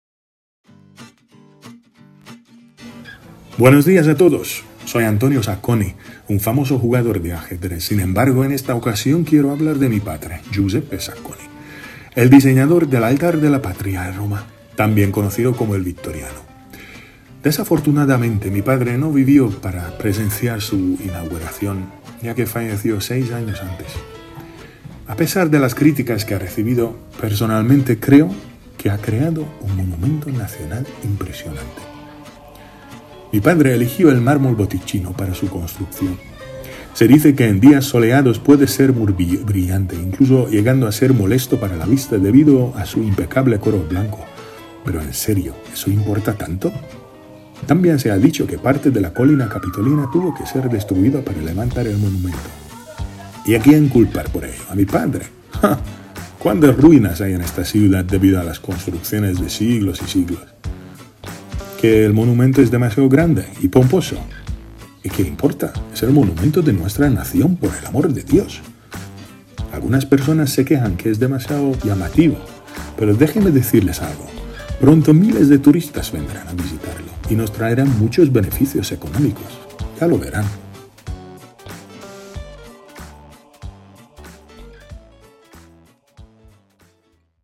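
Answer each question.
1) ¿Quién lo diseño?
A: Giuseppe Sacconi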